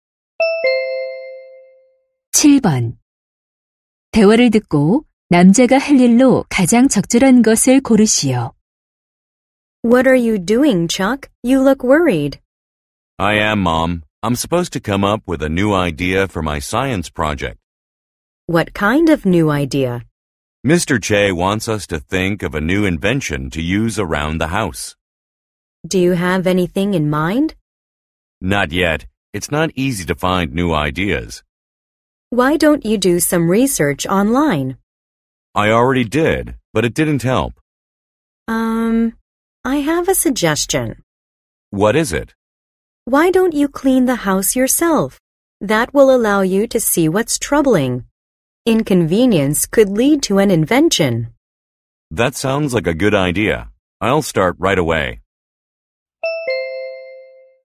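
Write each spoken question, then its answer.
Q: 대화를 듣고 남자가 할 일로 가장 적절한 것을 고르시오.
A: 직접 집 청소하기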